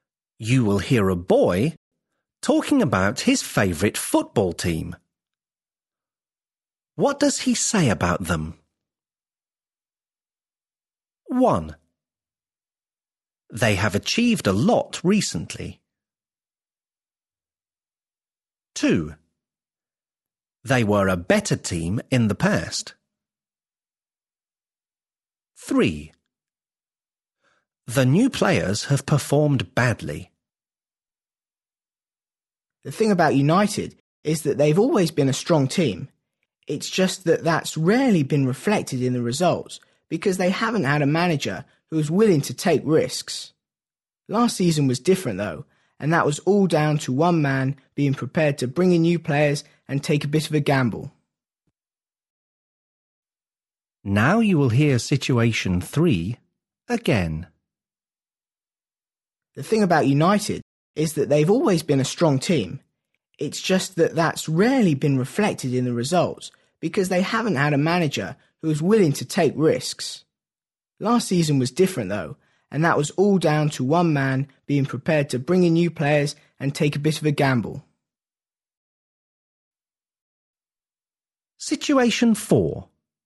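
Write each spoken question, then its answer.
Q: What does he say about them?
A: 1: They have achieved a lot recently.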